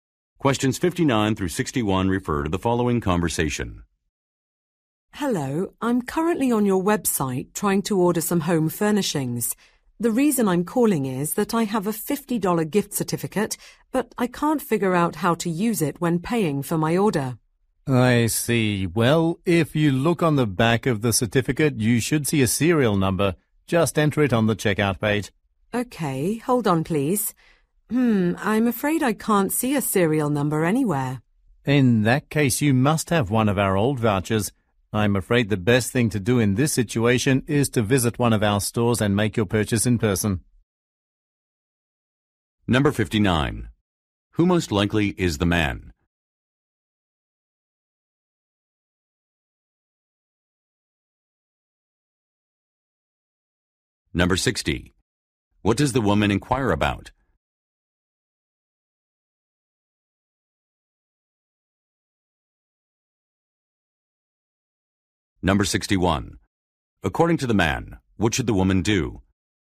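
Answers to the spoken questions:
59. A customer service representative for a home furnishings store
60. How to use a gift certificate
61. Visit a store and buy in person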